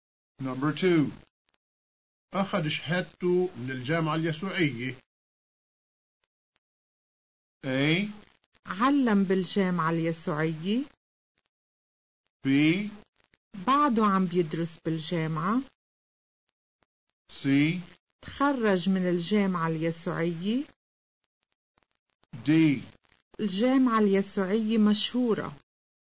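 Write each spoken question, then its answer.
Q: أخذ شهادته من الجامعة اليسوعية.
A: C: تخرج من الجامعة اليسوعية.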